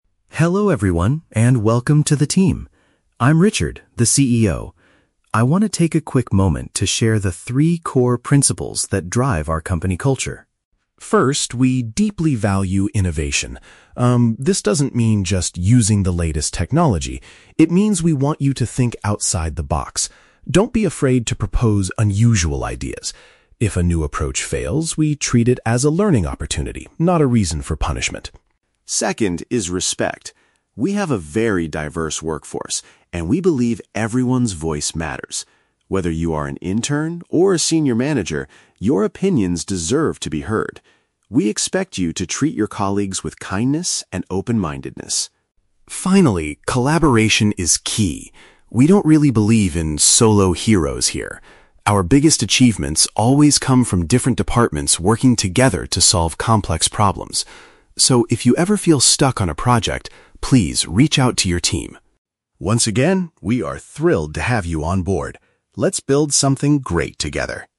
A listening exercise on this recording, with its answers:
Listen to the CEO's welcome speech and choose the correct answer (A, B, or C).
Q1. How does the company view employees whose new ideas do not succeed?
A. They face severe punishment from the management.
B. They are encouraged to use the experience to gain knowledge.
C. They must pay for any financial damage they cause.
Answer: They are encouraged to use the experience to gain knowledge.

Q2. What is the company's attitude toward staff at different levels?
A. Only senior managers are allowed to make the final decisions.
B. Interns must complete an extra training course on diversity.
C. Every worker has the right to express their thoughts and ideas.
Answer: Every worker has the right to express their thoughts and ideas.

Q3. According to the CEO, how does the company achieve its most significant successes?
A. By having various groups join forces to tackle challenges.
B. By encouraging individuals to work independently like heroes.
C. By hiring the most talented and expensive experts in the industry.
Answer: By having various groups join forces to tackle challenges.

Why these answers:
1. The CEO says that if a new approach fails, they treat it as a "learning opportunity." Option B perfectly paraphrases this as using the experience to "gain knowledge." Why the trap is wrong: Option (A) is a trap. The audio mentions the word "punishment," but the CEO explicitly says failure is not a reason for punishment. Option (C) is a plausible consequence in a strict company, but it is never mentioned in the speech.
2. Richard states that "everyone's voice matters" and that opinions "deserve to be heard," regardless of whether someone is an intern or a manager. Option C captures this core message using synonyms. Why the trap is wrong: Option (A) is a trap. The phrase "senior manager" is used in the audio, but not to say they make all the decisions. Option (B) is also a trap; "intern" and "diverse" (diversity) are mentioned, but there is no mention of a training course.
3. The CEO explains that the biggest achievements come from "different departments working together to solve complex problems." Option A paraphrases this as "various groups join forces to tackle challenges." Why the trap is wrong: Option (B) is a trap. The phrase "solo heroes" is spoken in the audio, but the CEO states they don't believe in that concept. Option (C) is a plausible corporate strategy but is completely absent from the monologue.

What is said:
Richard: Hello everyone, and welcome to the team. I'm Richard, the CEO. I want to take a quick moment to share the three core principles that drive our company culture.
First, we deeply value innovation. Um, this doesn't mean just using the latest technology. It means we want you to think outside the box. Don't be afraid to propose unusual ideas. If a new approach fails, we treat it as a learning opportunity, not a reason for punishment.
Second is respect. We have a very diverse workforce, and we believe everyone's voice matters. Whether you are an intern or a senior manager, your opinions deserve to be heard. We expect you to treat your colleagues with kindness and open-mindedness.
Finally, collaboration is key. We don't really believe in 'solo heroes' here. Our biggest achievements always come from different departments working together to solve complex problems. So, if you ever feel stuck on a project, please reach out to your team.
Once again, we are thrilled to have you on board. Let's build something great together.

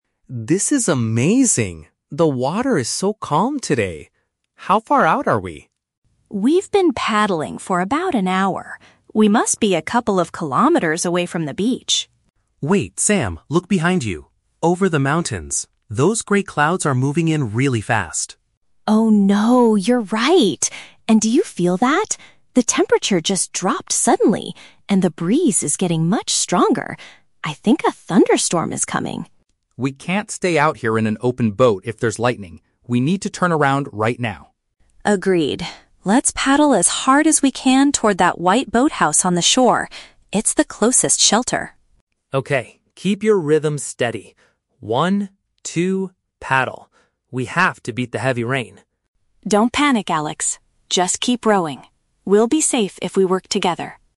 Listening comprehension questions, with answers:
Listen to the conversation between two friends kayaking. Choose the correct answer (A, B, or C) for each question.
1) How do the friends realize that the weather is changing?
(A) They hear loud thunder and see a flash of light over the mountains.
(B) They receive an urgent storm warning on their mobile phones.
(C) They spot dark shapes in the sky and feel the air getting colder.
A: They spot dark shapes in the sky and feel the air getting colder.

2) Why do they decide to head back to the beach immediately?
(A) Because sitting in an uncovered vessel during an electric storm is very dangerous.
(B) Because they have been rowing for an hour and are feeling too exhausted.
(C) Because the strong wind is starting to push their boat toward the rocks.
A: Because sitting in an uncovered vessel during an electric storm is very dangerous.

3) What is their immediate action plan?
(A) To wait near the mountains until the bad weather completely passes by.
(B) To row quickly toward a specific building on the coast to hide from the ra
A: To row quickly toward a specific building on the coast to hide from the ra

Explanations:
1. Alex points out the "grey clouds" (dark shapes in the sky), and Sam notices that "the temperature just dropped" (the air getting colder). Option C perfectly paraphrases these observations.
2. Alex states, "We can't stay out here in an open boat if there's lightning." Option A uses synonyms: "uncovered vessel" (open boat) and "electric storm" (lightning).
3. Sam says, "Let's paddle as hard as we can toward that white boathouse on the shore. It's the closest shelter." Option B paraphrases this: row quickly (paddle hard) toward a specific building (white boathouse) on the coast (shore) to hide (shelter).

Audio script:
Alex: This is amazing! The water is so calm today. How far out are we?
Sam: We've been paddling for about an hour. We must be a couple of kilometers away from the beach.
Alex: Wait, Sam, look behind you. Over the mountains. Those grey clouds are moving in really fast.
Sam: Oh no. You're right. And do you feel that? The temperature just dropped suddenly, and the breeze is getting much stronger. I think a thunderstorm is coming.
Alex: We can't stay out here in an open boat if there's lightning. We need to turn around right now.
Sam: Agreed. Let's paddle as hard as we can toward that white boathouse on the shore. It's the closest shelter.
Alex: Okay, keep your rhythm steady! We have to beat the heavy rain.

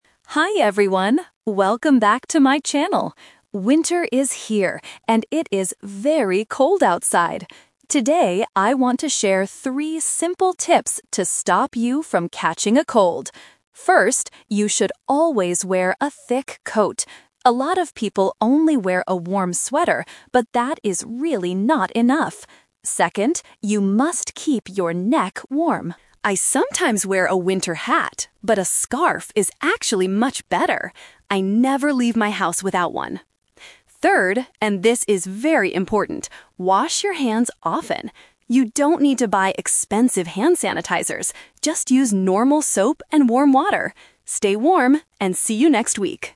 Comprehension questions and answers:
Listen to a vlogger giving advice about the winter season. Choose the correct answer (A, B, or C) for each question.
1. What does the vlogger say about wearing a sweater outside?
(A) It is not enough to keep your body warm.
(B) It is the best piece of clothing for winter.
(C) It is too heavy to wear every day.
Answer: It is not enough to keep your body warm.

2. What does the vlogger think is the best thing to keep your neck warm?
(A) A winter hat.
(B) A scarf.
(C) A hot drink.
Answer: A scarf.

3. What should people use to clean their hands?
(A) Expensive hand sanitizers.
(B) Normal soap and warm water.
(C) A clean wet towel.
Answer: Normal soap and warm water.

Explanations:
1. The vlogger says, "A lot of people only wear a warm sweater, but that is really not enough." This means it cannot keep you warm by itself.
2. The vlogger says, "a scarf is actually much better" and "I never leave my house without one."
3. The vlogger clearly gives the advice: "Just use normal soap and warm water."

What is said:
Vlogger: Hi everyone! Welcome back to my channel. Winter is here, and it is very cold outside. Today, I want to share three simple tips to stop you from catching a cold.
First, you should always wear a thick coat. A lot of people only wear a warm sweater, but that is really not enough. Second, you must keep your neck warm. I sometimes wear a winter hat, but a scarf is actually much better. I never leave my house without one. Third, and this is very important, wash your hands often! You don't need to buy expensive hand sanitizers.

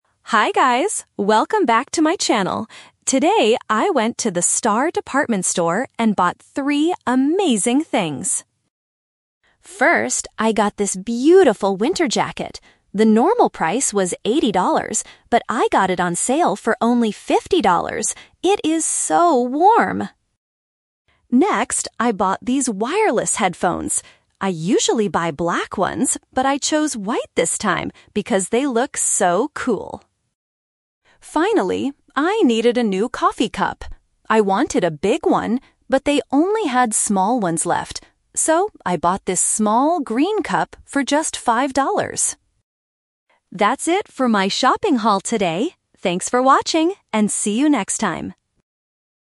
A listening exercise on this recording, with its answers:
A vlogger is showing her followers the things she bought from a department store today. Listen to the vlog and choose the correct answer (A, B, or C) for each question.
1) How much did the vlogger pay for the winter jacket?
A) $30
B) $50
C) $80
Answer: $50

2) What color are the new headphones?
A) Black.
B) White.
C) Silver.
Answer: White.

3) Why did the vlogger buy a SMALL coffee cup?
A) Because the big ones were too expensive.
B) Because she likes small cups.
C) Because the store didn't have any big ones.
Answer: Because the store didn't have any big ones.

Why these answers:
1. This is a number trap. The vlogger says, "The normal price was eighty dollars, but I got it on sale for only fifty dollars." Why the trap is wrong: Option (C) $80 is the trap because it is the normal price before the discount. Option (A) $30 is a plausible price, but it is not mentioned.
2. She says about the headphones, "I usually buy black ones, but I chose white this time..." Why the trap is wrong: Option (A) is the trap. Black is the color she usually buys, but not the color she bought today. Option (C) is a plausible color for electronics but is never mentioned.
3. She explains the situation: "I wanted a big one, but they only had small ones left." This means the store ran out of big cups. Why the trap is wrong: Option (B) is a trap because she actually "wanted a big one," so she doesn't prefer small cups. Option (A) is a very common reason for not buying something, but she didn't talk about the price of the big cups.

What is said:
Vlogger: Hi guys, welcome back to my channel! Today, I went to the Star Department Store and bought three amazing things.
First, I got this beautiful winter jacket. The normal price was eighty dollars, but I got it on sale for only fifty dollars. It is so warm!
Next, I bought these wireless headphones. I usually buy black ones, but I chose white this time because they look so cool.
Finally, I needed a new coffee cup. I wanted a big one, but they only had small ones left. So, I bought this small green cup for just five dollars.
That's it for my shopping haul today! Thanks for watching and see you next time!

